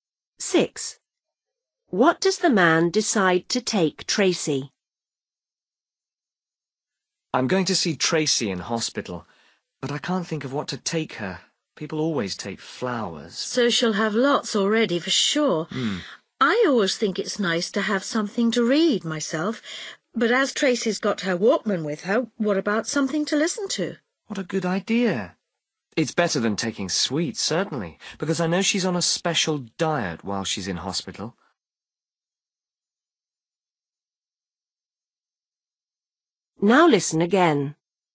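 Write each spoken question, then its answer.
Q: What does the man decide to take Tracy?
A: something to listen to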